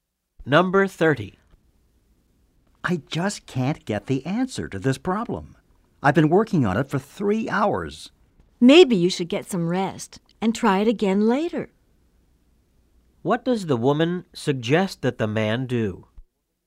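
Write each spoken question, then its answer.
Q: What does the woman suggest that the man do?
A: Get some rest and try the problem again later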